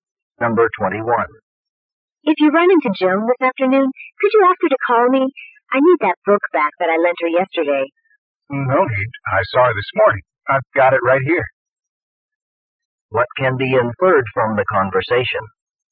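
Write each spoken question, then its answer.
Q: What can be inferred from the conversation?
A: Joan has already returned the book through the man.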